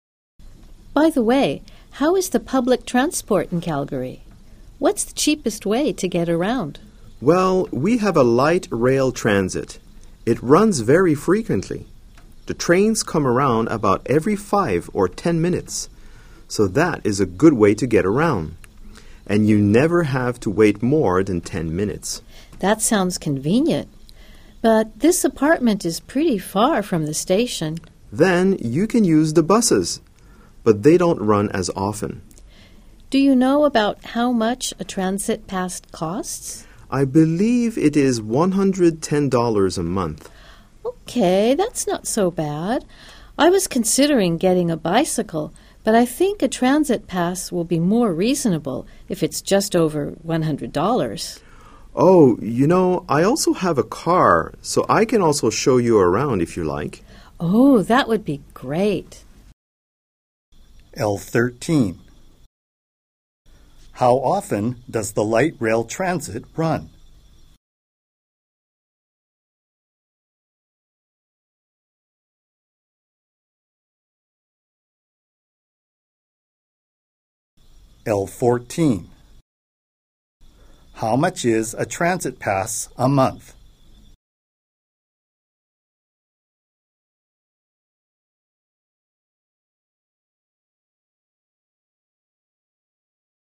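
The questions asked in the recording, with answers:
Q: How often does the light rail transit run?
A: About every 5 or 10 minutes

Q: How much is a transit pass a month?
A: $110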